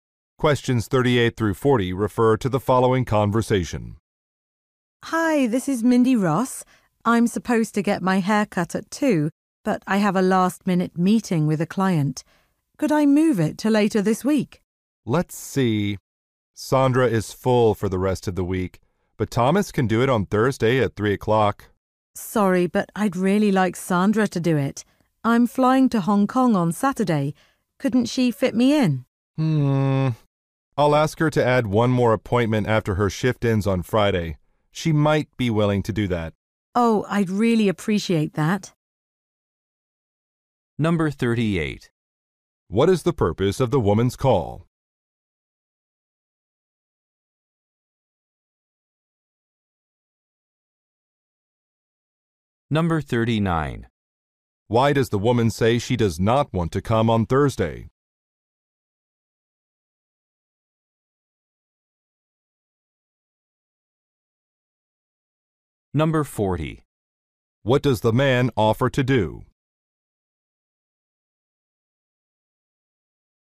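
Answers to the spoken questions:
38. To reschedule her haircut
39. She wants Sandra, not Thomas, to cut her hair
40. Ask Sandra to add an appointment after her Friday shift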